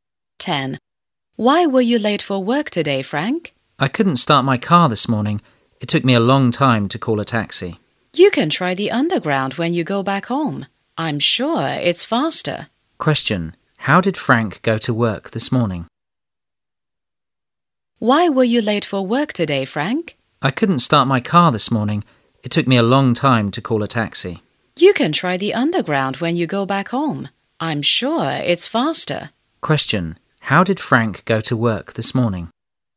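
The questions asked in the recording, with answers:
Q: How did Frank go to work this morning?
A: By taxi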